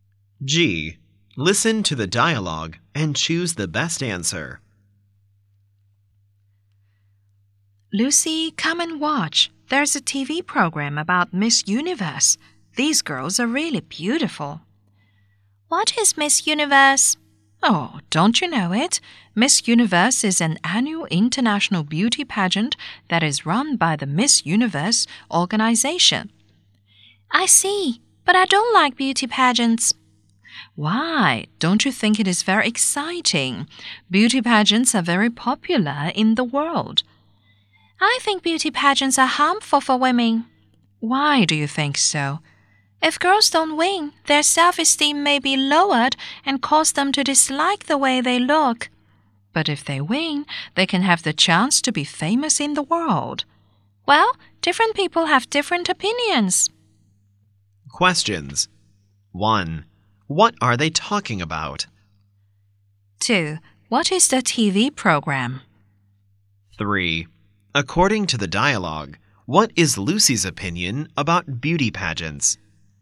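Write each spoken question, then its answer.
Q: What are they talking about?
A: Beauty pageants (Miss Universe)

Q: What is the TV program?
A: A program about Miss Universe

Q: According to the dialogue, what is Lucy's opinion about beauty pageants?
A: She thinks they are harmful for women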